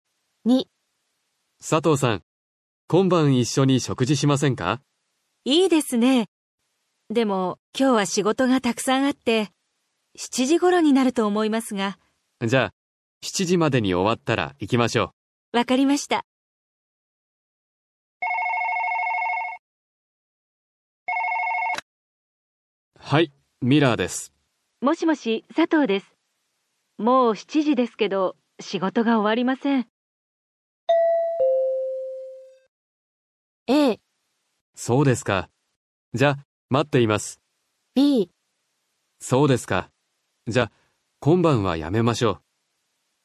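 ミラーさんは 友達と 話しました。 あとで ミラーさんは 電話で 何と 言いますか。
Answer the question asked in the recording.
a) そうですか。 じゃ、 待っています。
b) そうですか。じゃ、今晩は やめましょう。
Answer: b) そうですか。じゃ、今晩は やめましょう。

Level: N5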